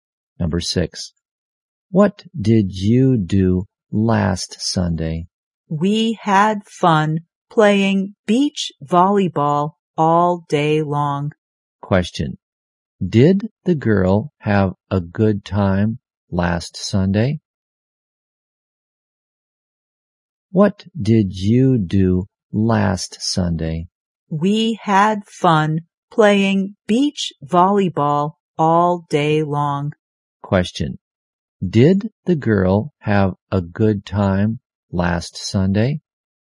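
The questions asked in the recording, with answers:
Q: Did the girl have a good time last Sunday?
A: Yes, she did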